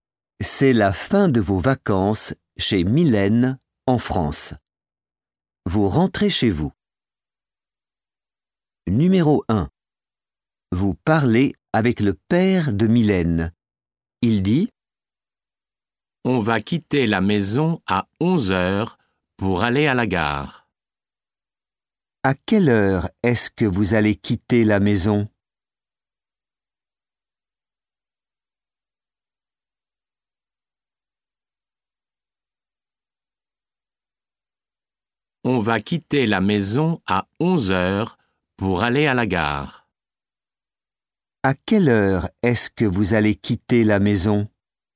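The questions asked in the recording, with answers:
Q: À quelle heure est-ce que vous allez quitter la maison?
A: À 11 heures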